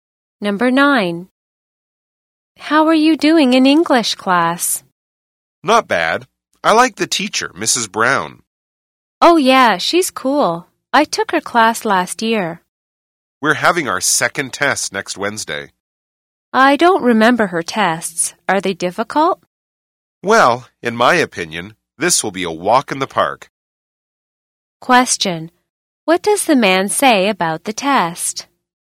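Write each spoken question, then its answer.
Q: What does the man say about the test?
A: It will be easy (a walk in the park)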